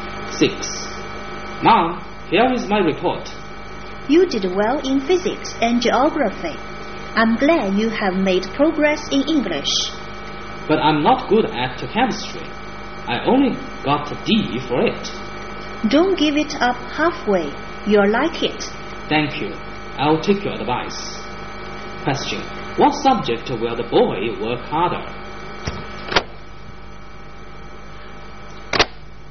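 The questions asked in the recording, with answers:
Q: What subject will the boy work harder?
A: Chemistry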